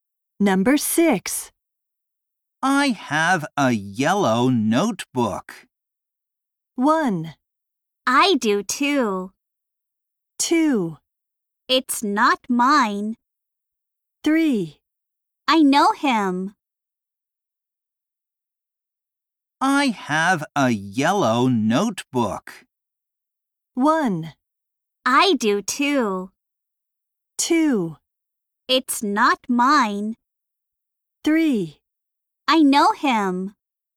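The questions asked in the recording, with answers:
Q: I have a yellow notebook.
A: 1: I do too.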